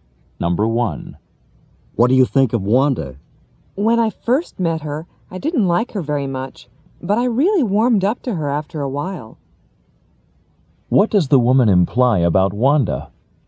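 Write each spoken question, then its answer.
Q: What does the woman imply about Wanda?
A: She didn't like Wanda at first but came to like her after a while.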